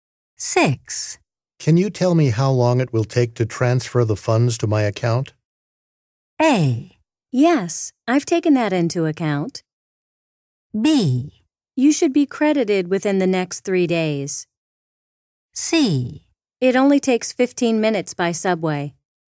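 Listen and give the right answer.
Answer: B: You should be credited within the next 3 days.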